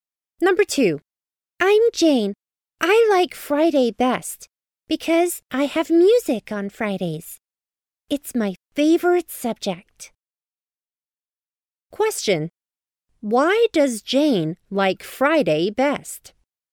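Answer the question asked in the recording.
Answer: Because she has music on Fridays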